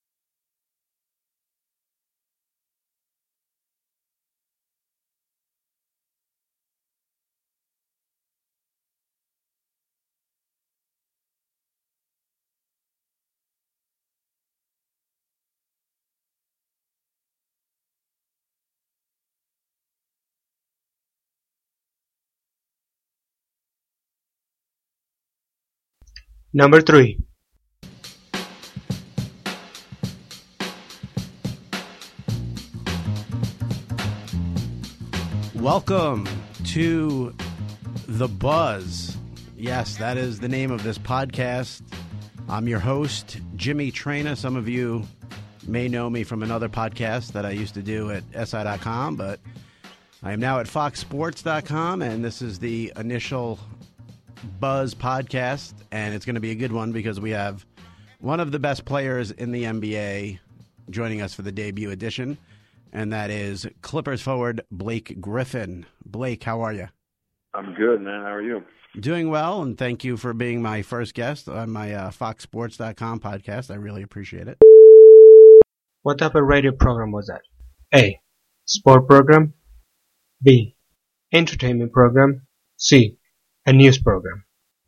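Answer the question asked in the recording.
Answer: A: Sport program.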